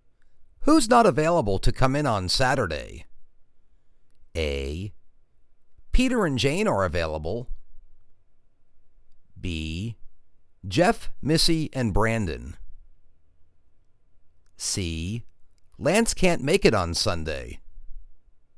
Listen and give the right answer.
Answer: Geoff, Missy, and Brandon.